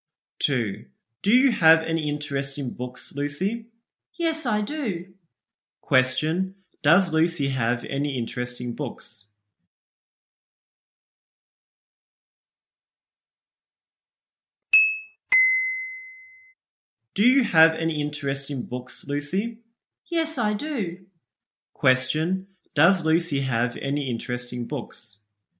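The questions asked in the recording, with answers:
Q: does Lucy have any interesting books?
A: Yes, she does.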